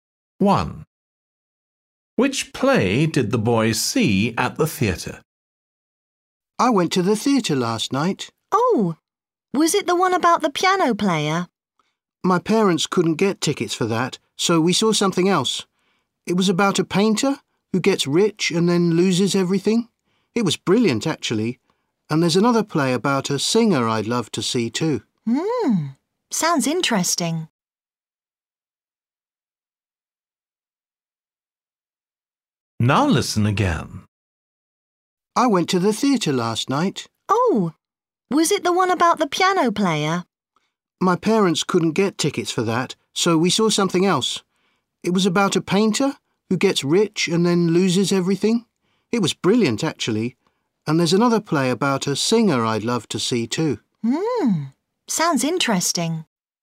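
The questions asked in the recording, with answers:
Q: Which play did the boy see at the theatre?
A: the play about a painter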